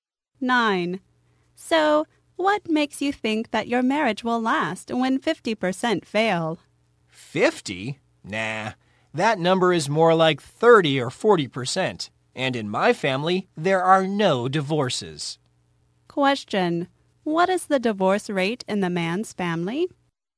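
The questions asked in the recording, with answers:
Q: What is the divorce rate in the man's family?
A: Zero; there are no divorces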